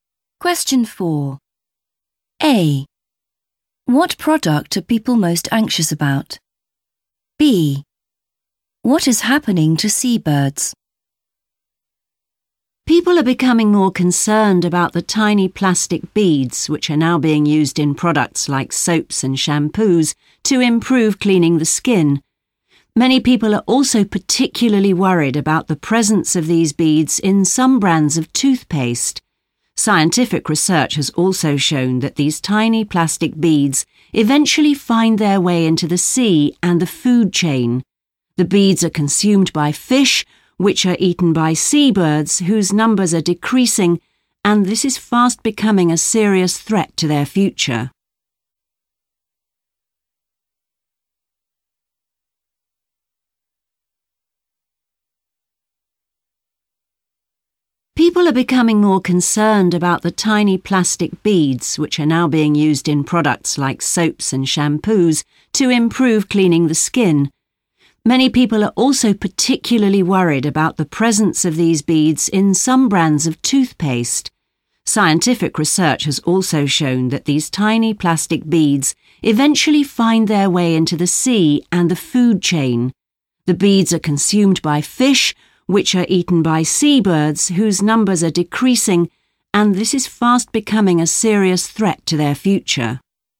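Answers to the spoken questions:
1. toothpaste
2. their numbers are decreasing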